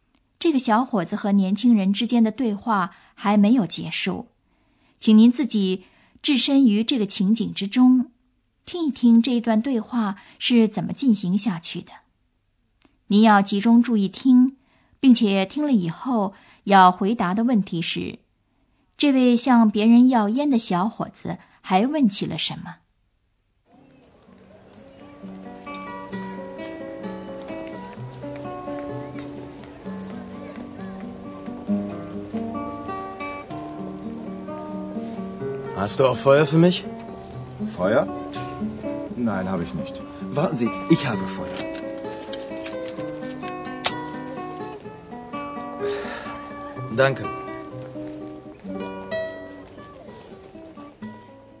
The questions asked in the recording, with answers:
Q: 这位向别人要烟的小伙子还问起了什么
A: 吸烟就得要火